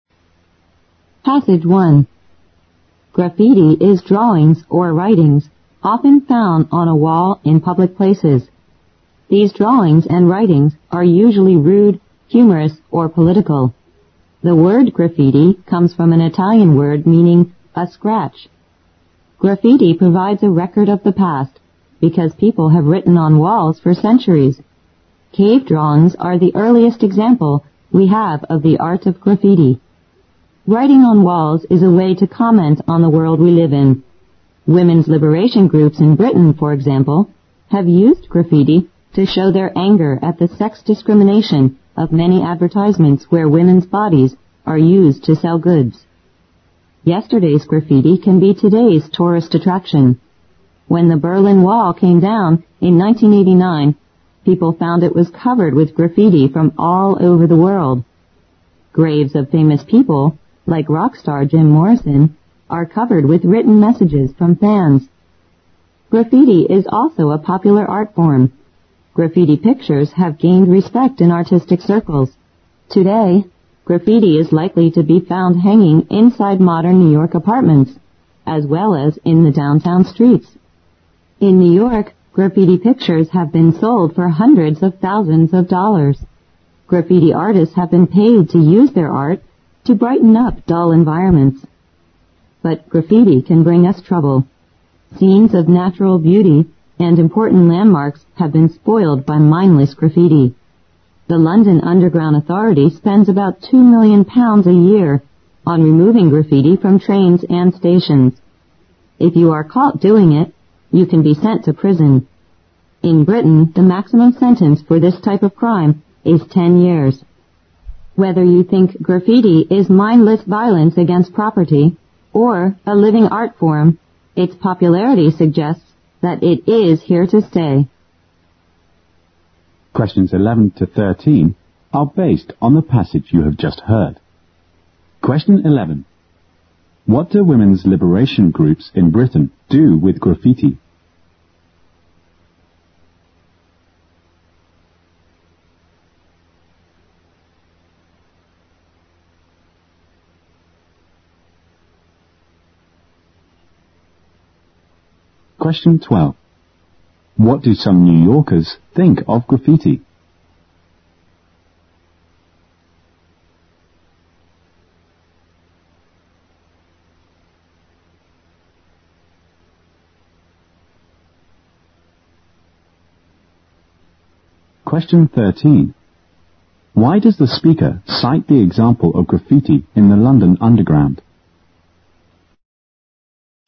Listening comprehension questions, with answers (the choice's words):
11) What did women's liberation groups in Britain do with graffiti?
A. Rally support for their movement.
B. Liberate women from tedious housework.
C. Claim their rights to equal job opportunities.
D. Express their anger against sex discrimination.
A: Express their anger against sex discrimination.

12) What do some New Yorkers think of graffiti?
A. It will bring a lot of trouble to the local people.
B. It is a popular form of art.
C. It will spoil the natural beauty of their surroundings.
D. It is popular among rock stars.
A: It is a popular form of art.

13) Why does the speaker cite the example of graffiti in the London underground?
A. To show that mindless graffiti can provoke violence.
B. To show that Londoners have a special liking for graffiti.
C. To show that graffiti, in some cases, can constitute a crime.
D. To show that graffiti can make the environment more colorful.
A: To show that graffiti, in some cases, can constitute a crime.

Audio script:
Graffiti is drawings or writings often found on a wall in public places. These drawings and writings are usually rude, humorous or political. The word "graffiti" comes from an Italian word meaning "a scratch". Graffiti provides the record of the past, because people have written on walls for centuries. Keep drawings are the earliest example we have of the art graffiti. Writing on walls is a way to comment the world we live in. Women's liberation groups in Britain, for example, have used graffiti to show their anger at the sex discrimination(11) of many advertisements where women's bodies are used to sell goods. Yesterday's graffiti can be today's tourist attraction. When the Berlin Wall came down in 1989, people found it was covered with graffiti from all over the world. Graves of famous people, like rock star Jim Morrison, are covered with written messages from fans. Graffiti is also a popular art form. Graffiti pictures have gained respect in artistic circles. Today, graffiti is likely to be found hanging inside modern New York apartments as well as in the downtown streets(12). In New York, graffiti pictures have been sold for hundreds of thousands of dollars. Graffiti artists have been paid to use their art to brighten up dull environments. But graffiti can bring us trouble. Things of natural beauty and important landmarks have been spoiled by mindless graffiti. The London underground authorities spend about 2 million pounds a year on removing graffiti from trains and stations. If you are caught doing it, you can be sent to a prison(13). In Britain, the maximum sentence for this type of crime is 10 years. Whether you think graffiti is mindless violence against property or a living art form, its popularity suggests that it is here to stay.

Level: 英语六级